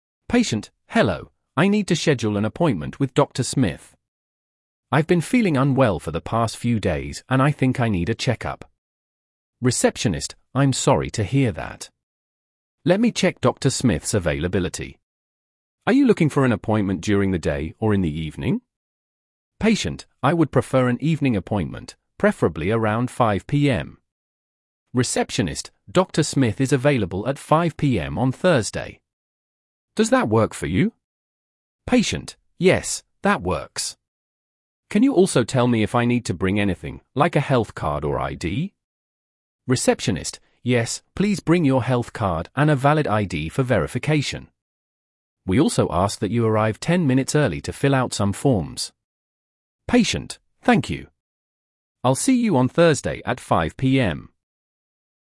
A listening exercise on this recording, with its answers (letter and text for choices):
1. What is the patient calling to schedule?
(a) A dental check-up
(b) A doctor's appointment with Dr. Smith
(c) A physical therapy session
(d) A medical consultation with a specialist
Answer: (b) A doctor's appointment with Dr. Smith

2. What time does the patient prefer for the appointment?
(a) 8:00 AM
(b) 10:00 AM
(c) 5:00 PM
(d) 7:00 PM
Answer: (c) 5:00 PM

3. When is Dr. Smith available for the appointment?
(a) Monday at 5:00 PM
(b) Thursday at 5:00 PM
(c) Wednesday at 6:00 PM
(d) Friday at 3:00 PM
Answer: (b) Thursday at 5:00 PM

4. What documents should the patient bring to the appointment?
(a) Only a health card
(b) Health card and ID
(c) Health card and insurance details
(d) No documents are needed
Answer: (b) Health card and ID

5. What is the patient asked to do before the appointment?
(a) Call to confirm again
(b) Arrive 10 minutes early to fill out forms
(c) Complete paperwork online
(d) Pay in advance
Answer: (b) Arrive 10 minutes early to fill out forms

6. How does the patient respond to the appointment time?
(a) They ask for a different time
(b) They confirm the appointment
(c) They cancel the appointment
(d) They reschedule for a different day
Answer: (b) They confirm the appointment

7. What is the receptionist's role in this conversation?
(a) To check the patient's insurance coverage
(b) To schedule the doctor's appointment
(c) To provide medical advice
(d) To take the patient's medical history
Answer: (b) To schedule the doctor's appointment

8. What is the primary reason for the patient's call?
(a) To inquire about the doctor's credentials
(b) To schedule a check-up with Dr. Smith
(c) To ask for medical advice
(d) To confirm an existing appointment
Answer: (b) To schedule a check-up with Dr. Smith

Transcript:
Patient: "Hello, I need to schedule an appointment with Dr. Smith. I've been feeling unwell for the past few days and I think I need a check-up."
Receptionist: "I'm sorry to hear that. Let me check Dr. Smith's availability. Are you looking for an appointment during the day or in the evening?"
Patient: "I would prefer an evening appointment, preferably around 5:00 PM."
Receptionist: "Dr. Does that work for you?"
Patient: "Yes, that works. Can you also tell me if I need to bring anything, like a health card or ID?"
Receptionist: "Yes, please bring your health card and a valid ID for verification. We also ask that you arrive 10 minutes early to fill out some forms."
Patient: "Thank you. I'll see you on Thursday at 5:00 PM."